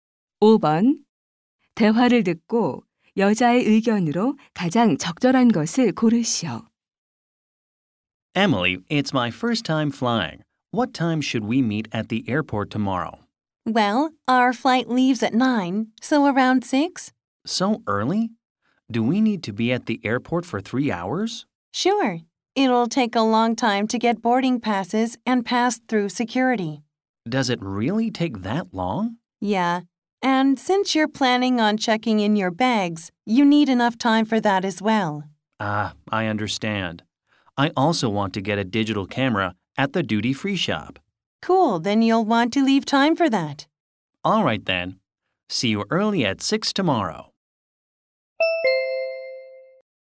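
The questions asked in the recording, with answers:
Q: 대화를 듣고 여자의 의견으로 가장 적절한 것을 고르시오.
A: 비행기를 타려면 공항에 일찍 도착해야 한다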